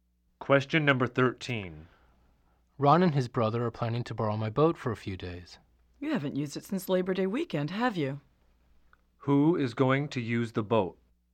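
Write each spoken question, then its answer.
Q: Who is going to use the boat?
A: Ron and his brother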